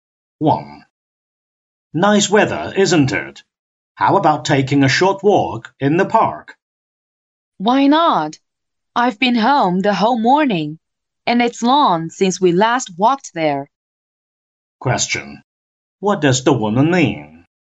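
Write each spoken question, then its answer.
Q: What does the woman mean?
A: She agrees to take a walk in the park.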